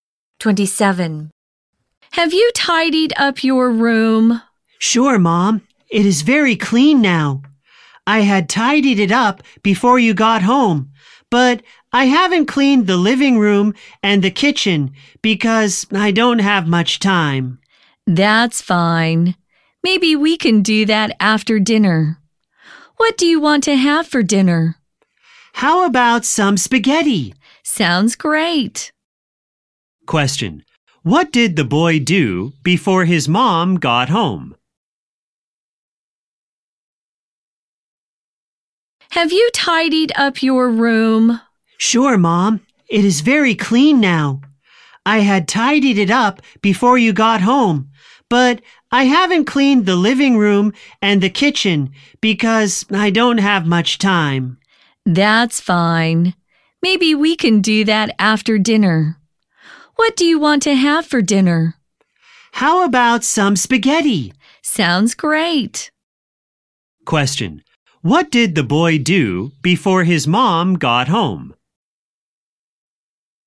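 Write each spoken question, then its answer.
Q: Question. What did the boy do before his mom got home?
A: He tidied up his room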